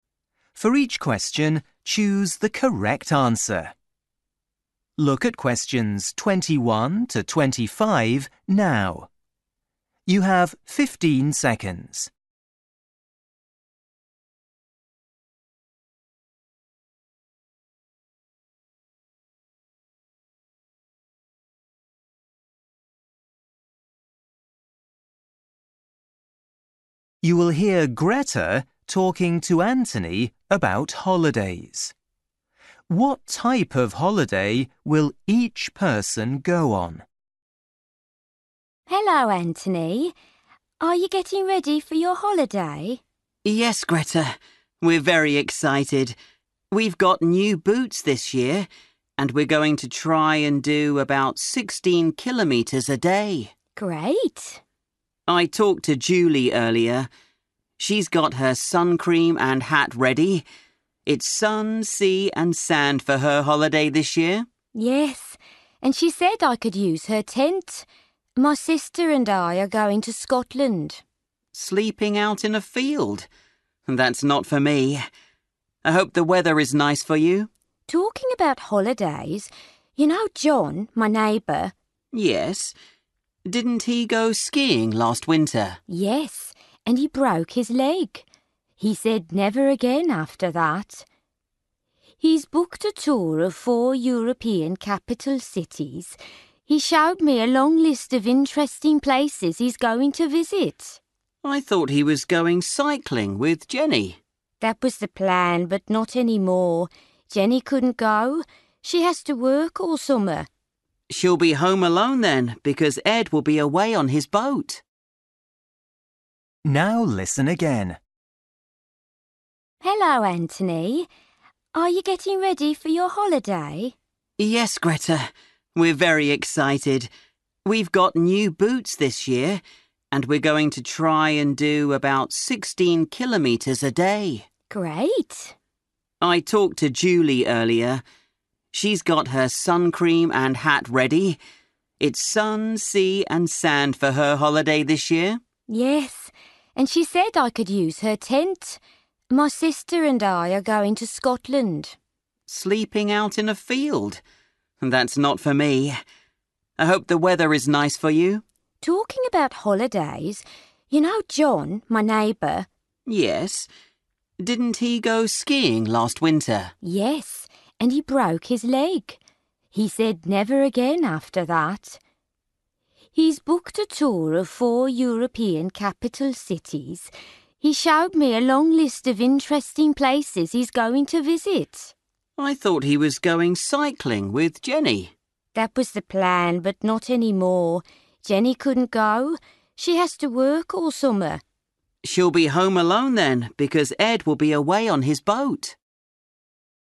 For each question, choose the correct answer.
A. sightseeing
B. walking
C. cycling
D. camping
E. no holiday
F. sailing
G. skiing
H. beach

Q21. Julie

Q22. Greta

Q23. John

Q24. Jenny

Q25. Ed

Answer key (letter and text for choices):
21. H. beach
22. D. camping
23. A. sightseeing
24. E. no holiday
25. F. sailing

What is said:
Greta: Hello Anthony. Are you getting ready for your holiday?
Anthony: Yes, Greta. We're very excited. We've got new boots this year and we're going to try and do about 16 kilometres a day!
Greta: Great.
Anthony: I talked to Julie earlier. She's got her suncream and hat ready – it's sun, sea and sand for her holiday this year.
Greta: Yes, and she said I could use her tent. My sister and I are going to Scotland.
Anthony: Sleeping out in a field? That's not for me. I hope the weather is nice for you.
Greta: Talking about holidays, you know John, my neighbour?
Anthony: Yes. Didn't he go skiing last winter?
Greta: Yes, and he broke his leg. He said 'never again!' after that. He's booked a tour of four European capital cities – he showed me a long list of interesting places he's going to visit.
Anthony: I thought he was going cycling with Jenny.
Greta: That was the plan, but not anymore. Jenny couldn't go. She has to work all summer.
Anthony: She'll be home alone, then because Ed will be away on his boat.
Now listen again.

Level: KET (A2)